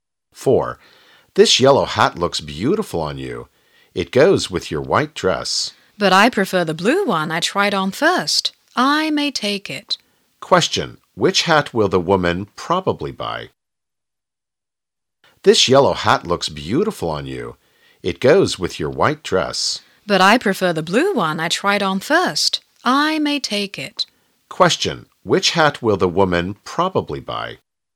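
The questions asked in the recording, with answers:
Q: Which hat will the woman probably buy?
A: The blue one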